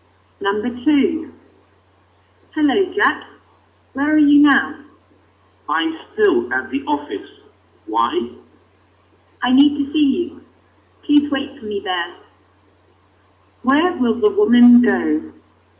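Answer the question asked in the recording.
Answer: To Jack's office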